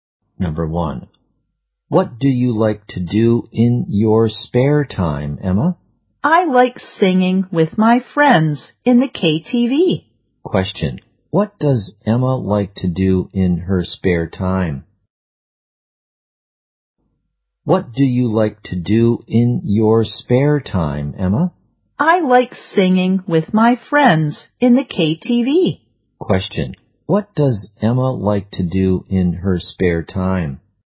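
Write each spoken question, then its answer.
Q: What does Emma like to do in her spare time?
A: Sing with her friends in the KTV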